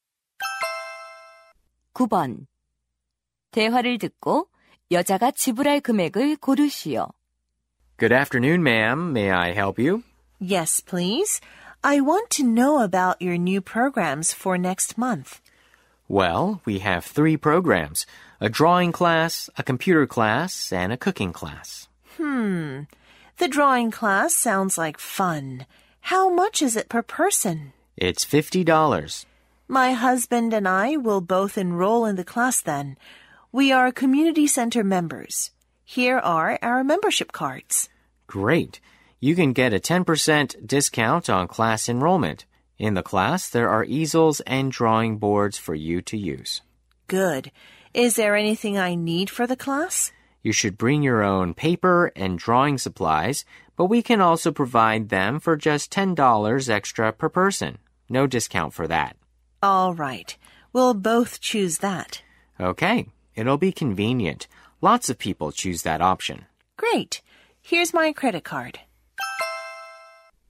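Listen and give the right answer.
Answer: $110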